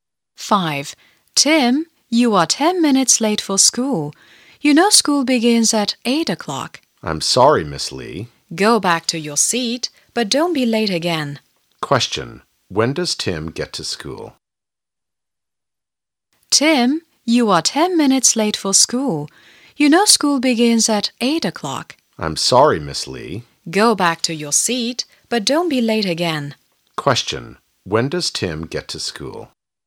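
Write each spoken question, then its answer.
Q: Question. When does Tim get to school?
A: At 8:10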